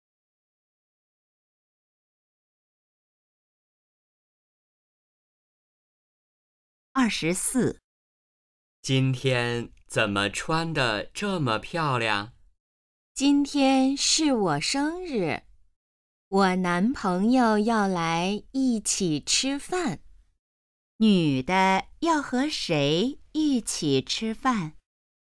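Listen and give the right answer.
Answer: 男朋友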